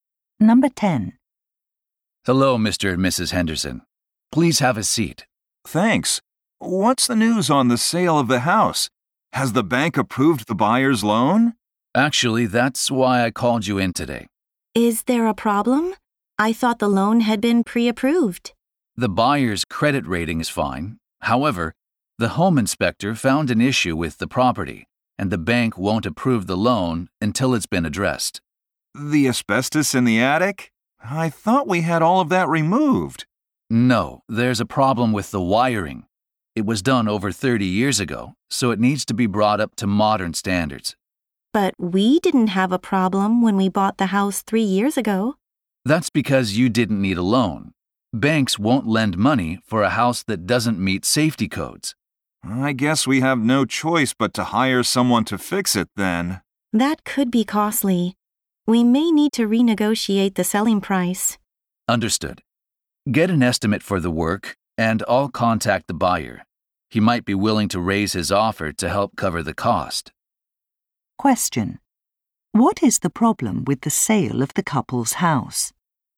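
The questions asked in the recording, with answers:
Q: What is the problem with the sale of the couple's house?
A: The old wiring doesn't meet safety codes, so the bank won't approve the buyer's loan until it is fixed.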